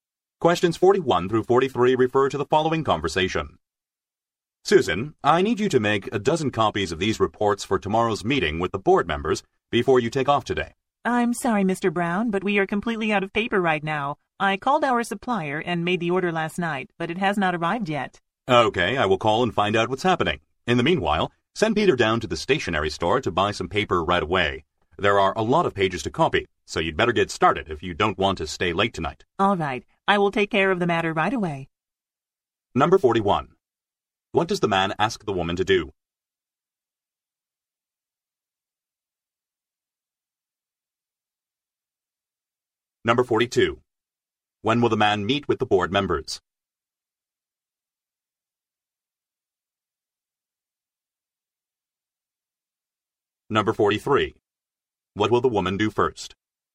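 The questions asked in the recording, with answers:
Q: What does the man ask the woman to do?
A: Make a dozen copies of the reports

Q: When will the man meet with the board members?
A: Tomorrow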